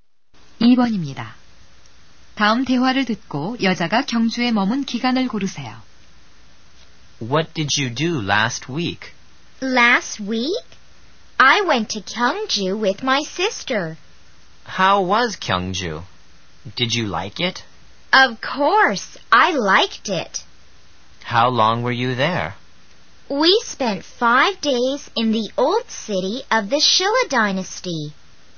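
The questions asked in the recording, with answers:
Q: 다음 대화를 듣고 여자가 경주에 머문 기간을 고르세요.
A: 5일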